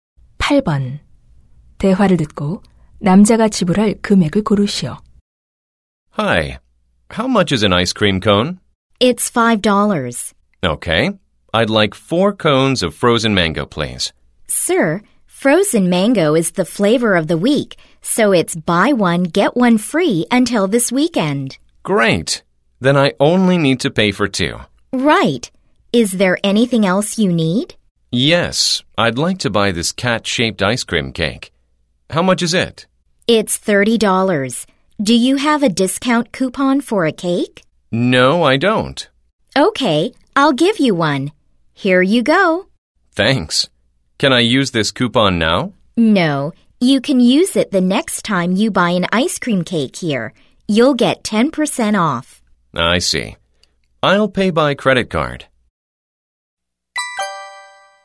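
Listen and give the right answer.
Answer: $40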